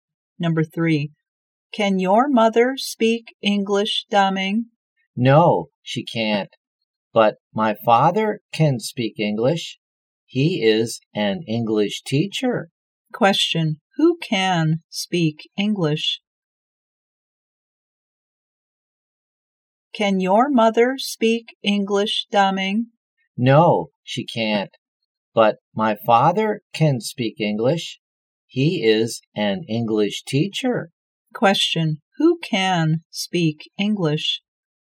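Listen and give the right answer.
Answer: Daming's father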